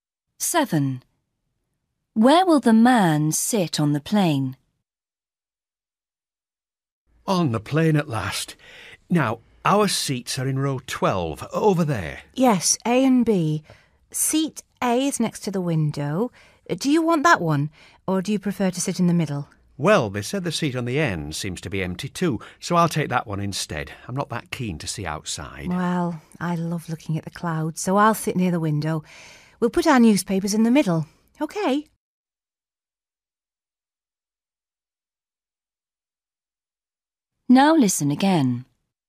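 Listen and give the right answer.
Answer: in the seat on the end (aisle)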